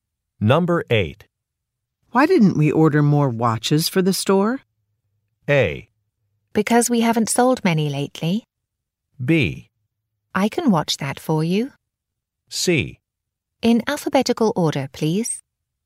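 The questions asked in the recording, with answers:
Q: Why didn't we order more watches for the store?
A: A: Because we haven't sold many lately.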